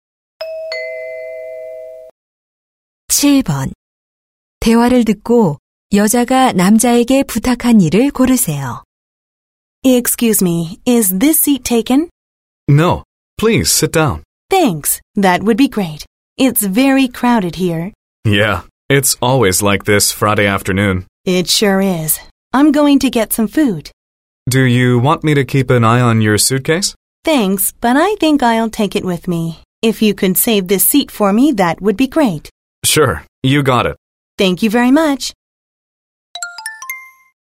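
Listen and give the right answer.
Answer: 자리 맡아 주기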